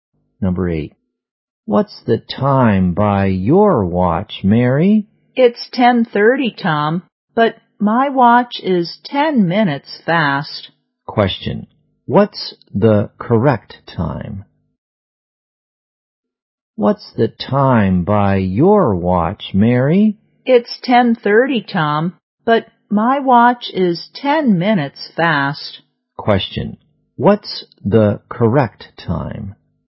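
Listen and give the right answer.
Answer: 10:20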